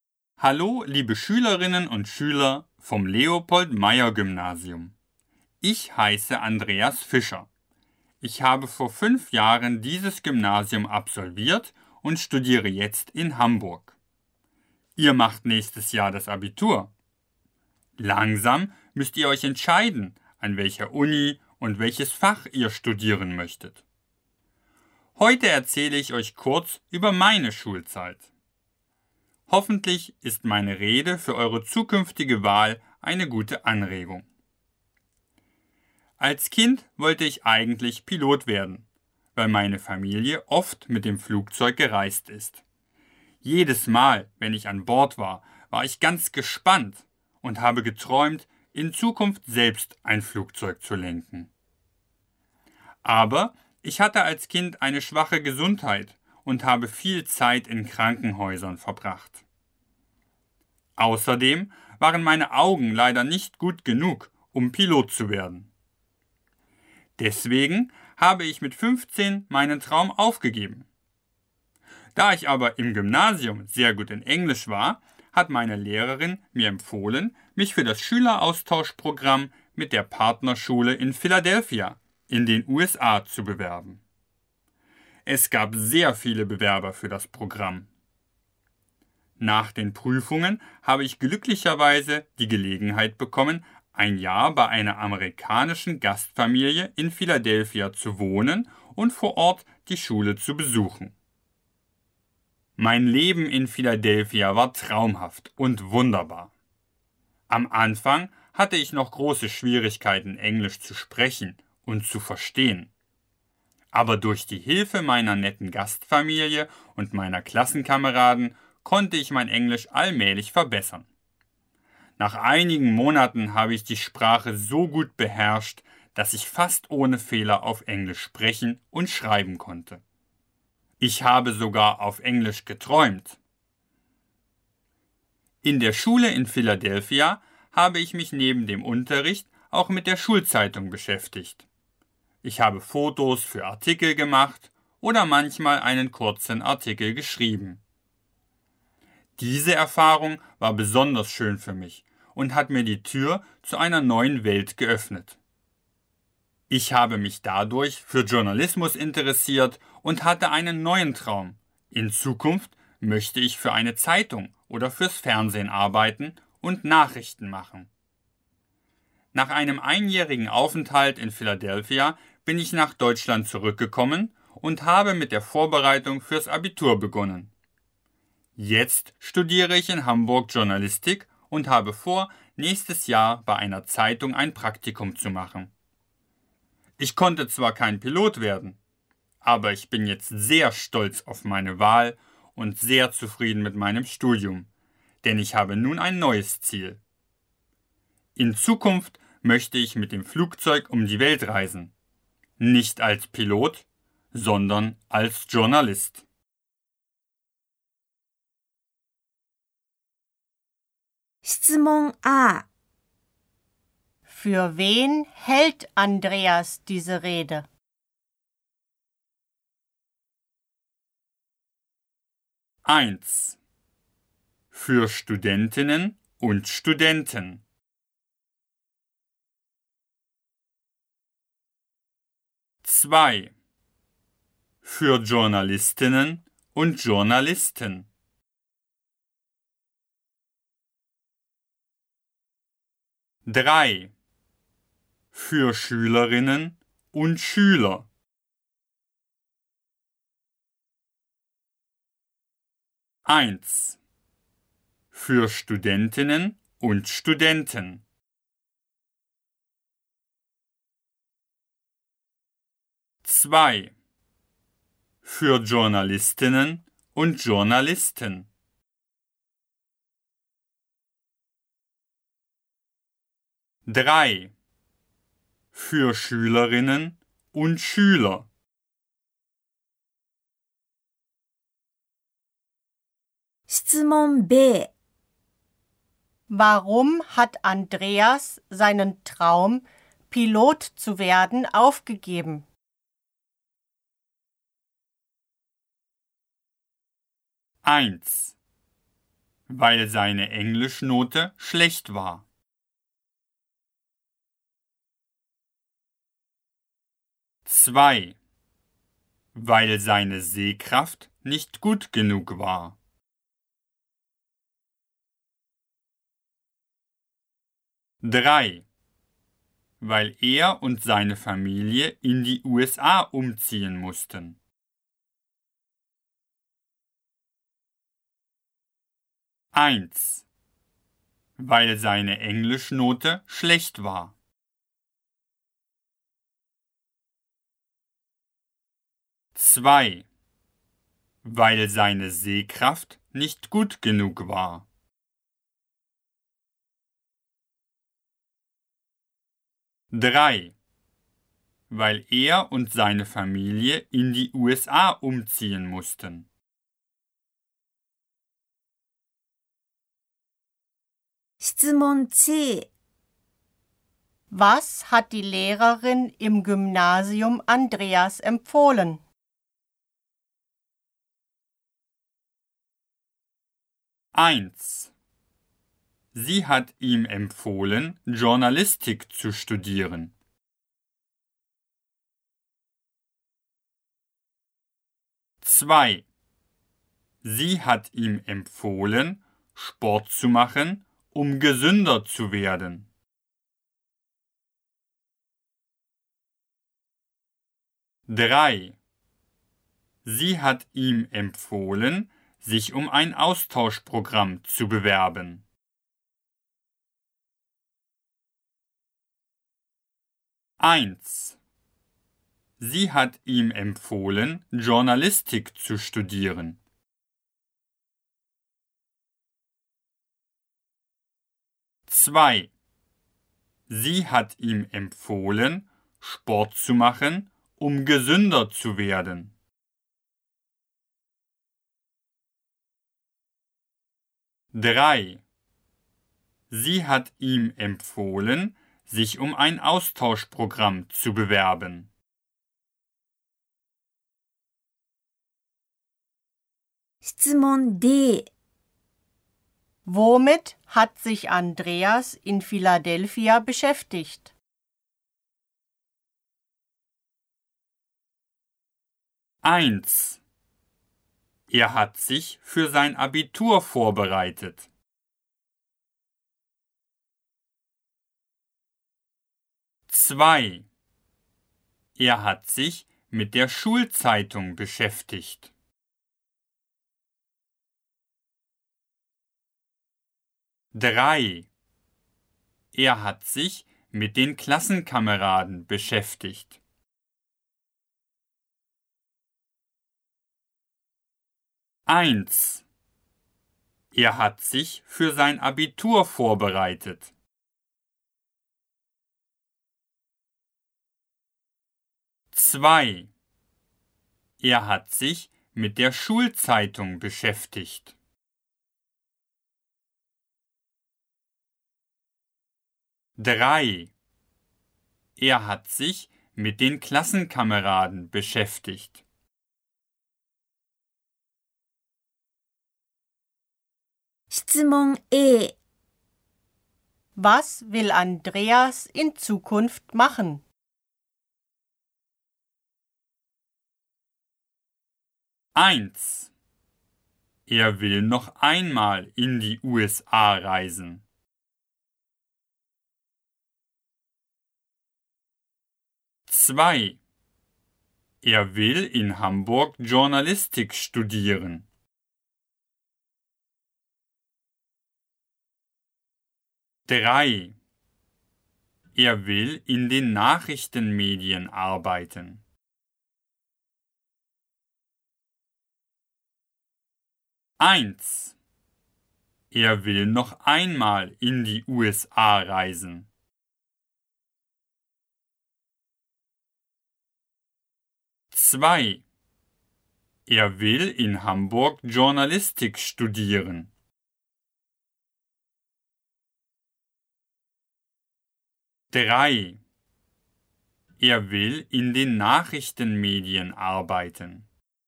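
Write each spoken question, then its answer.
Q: Für wen hält Andreas diese Rede?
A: 3: Für Schülerinnen und Schüler.

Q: Warum hat Andreas seinen Traum, Pilot zu werden, aufgegeben?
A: 2: Weil seine Sehkraft nicht gut genug war.

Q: Was hat die Lehrerin im Gymnasium Andreas empfohlen?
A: 3: Sie hat ihm empfohlen, sich um ein Austauschprogramm zu bewerben.

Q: Womit hat sich Andreas in Philadelphia beschäftigt?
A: 2: Er hat sich mit der Schulzeitung beschäftigt.

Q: Was will Andreas in Zukunft machen?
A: 3: Er will in den Nachrichtenmedien arbeiten.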